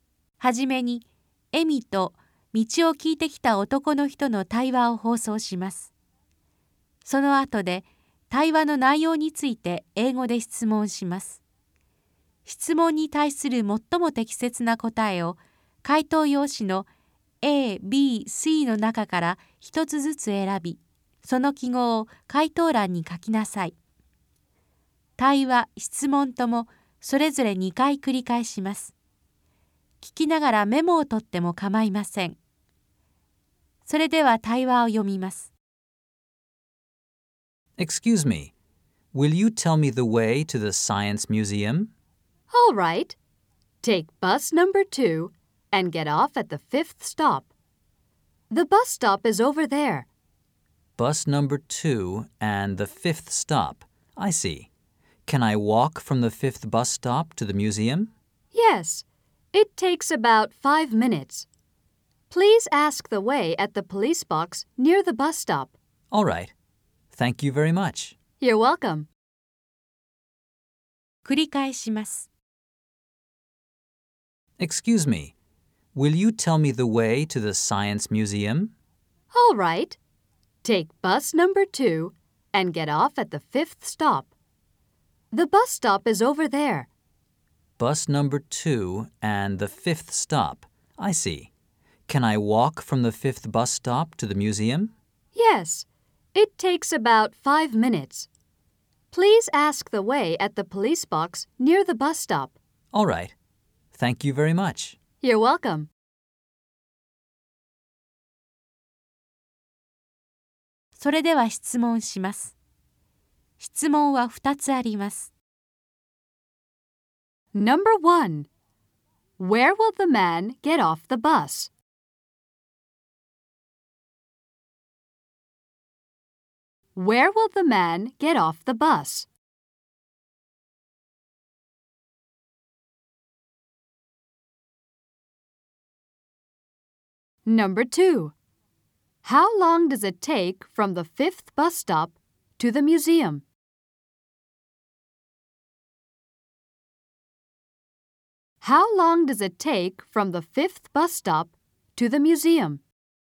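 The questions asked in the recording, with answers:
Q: Where will the man get off the bus?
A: At the 5th stop

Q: How long does it take from the 5th bus stop to the museum?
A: About 5 minutes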